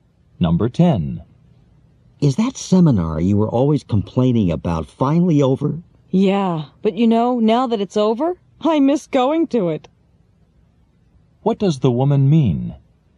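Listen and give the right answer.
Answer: She misses the seminar now that it's over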